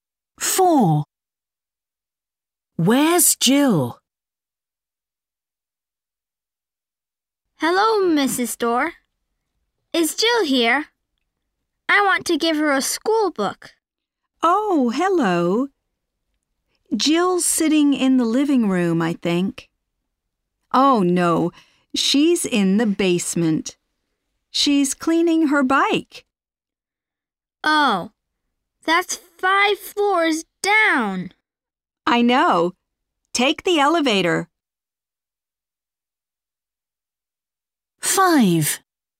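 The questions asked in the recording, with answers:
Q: Where's Jill?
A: In the basement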